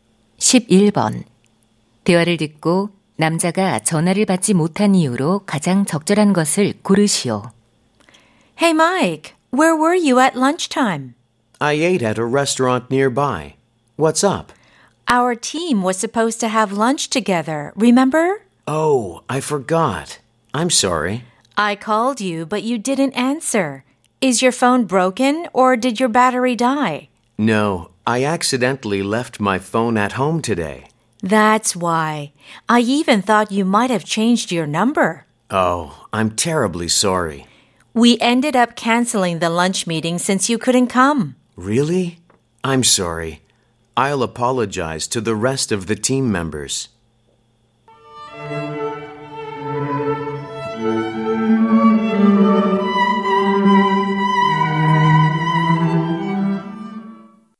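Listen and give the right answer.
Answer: 실수로 휴대폰을 집에 두고 와서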